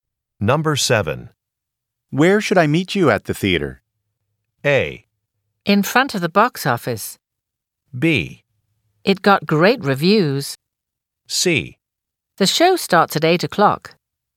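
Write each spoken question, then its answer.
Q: Where should I meet you at the theater?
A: A: In front of the box office.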